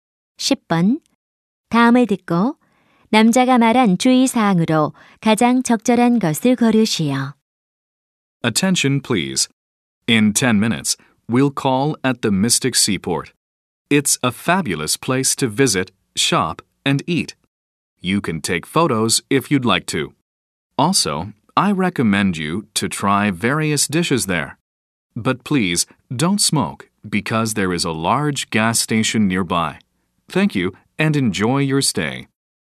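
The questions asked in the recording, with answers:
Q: 다음을 듣고 남자가 말한 주의 사항으로 가장 적절한 것을 고르시오.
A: 흡연 금지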